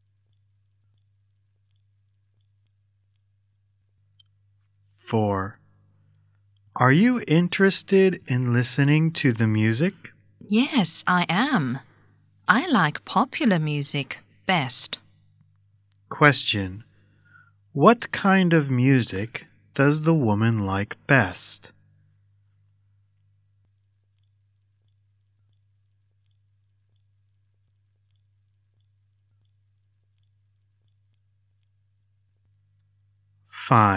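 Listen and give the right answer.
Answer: Popular music.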